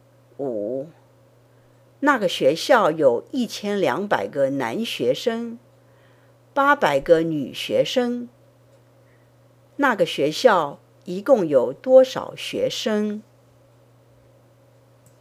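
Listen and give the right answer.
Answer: 2000个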